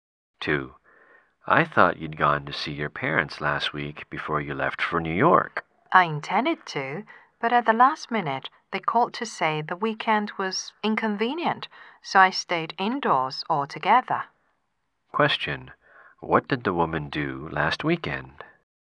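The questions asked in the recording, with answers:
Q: What did the woman do last weekend?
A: She stayed indoors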